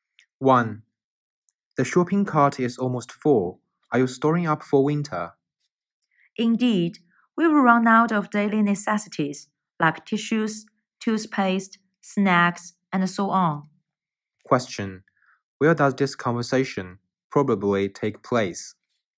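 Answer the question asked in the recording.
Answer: In a supermarket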